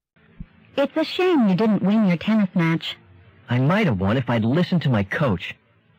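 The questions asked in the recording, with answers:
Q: What does the man imply?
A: He didn't follow his coach's advice, which may have cost him the match.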